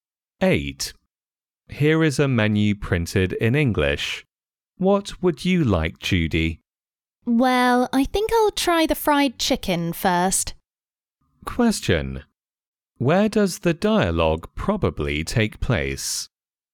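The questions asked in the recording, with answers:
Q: Where does the dialogue probably take place?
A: In a restaurant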